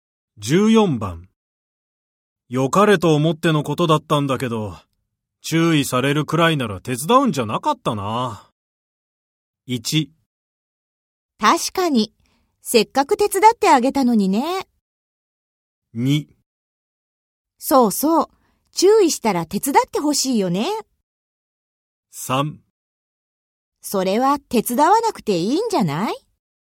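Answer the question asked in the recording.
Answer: 1: 確かに、せっかく手伝ってあげたのにね。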